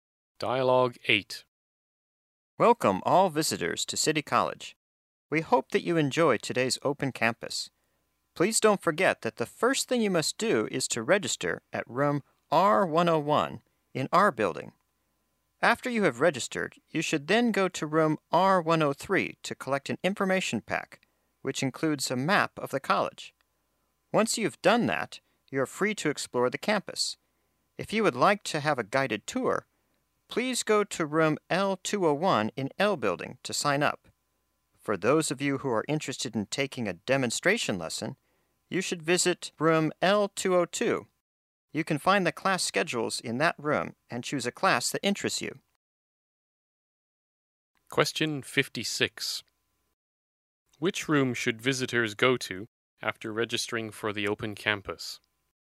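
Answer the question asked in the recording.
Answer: Room R103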